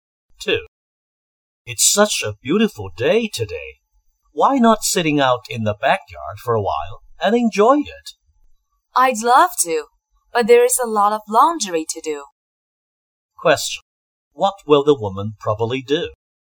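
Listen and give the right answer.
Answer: Do the laundry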